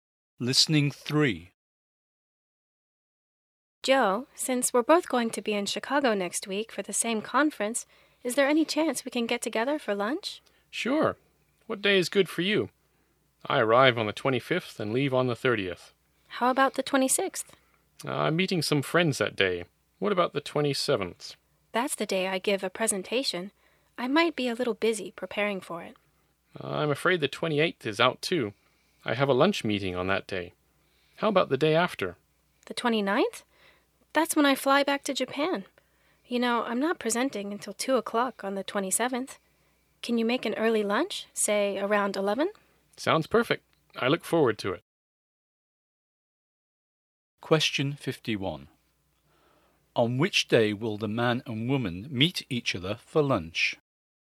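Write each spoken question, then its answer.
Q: On which day will the man and woman meet each other for lunch?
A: The 27th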